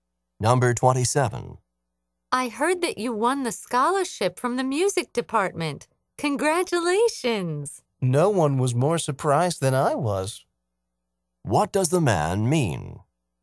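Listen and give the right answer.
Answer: He was very surprised to win the scholarship.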